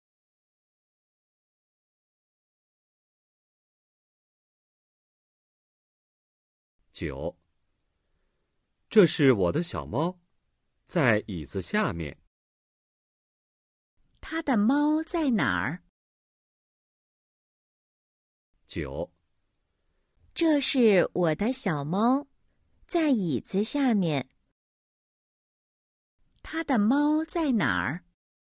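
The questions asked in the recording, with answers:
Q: 他的猫在哪儿?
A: 在椅子下面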